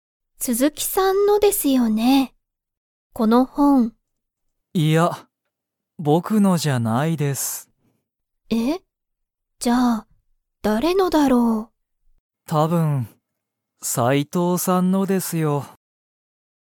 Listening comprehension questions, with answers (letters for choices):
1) その本ほんは、たぶん斎藤さいとうさんのですか?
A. はい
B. いいえ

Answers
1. A

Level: Level 1